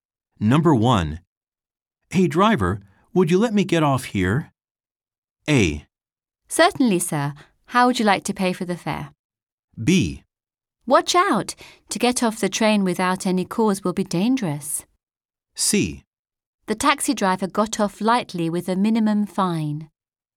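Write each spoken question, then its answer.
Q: Hey driver, would you let me get off here?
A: A: Certainly, sir. How would you like to pay for the fare?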